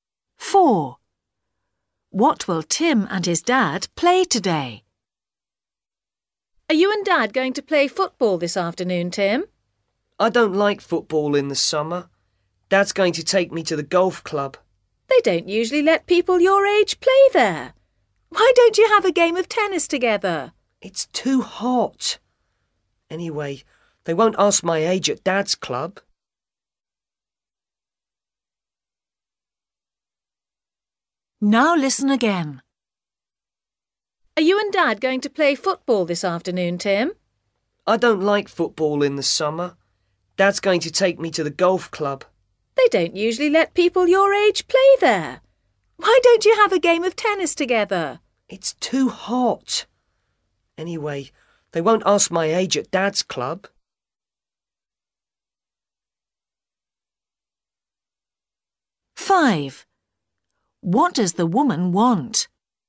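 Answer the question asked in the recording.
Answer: Golf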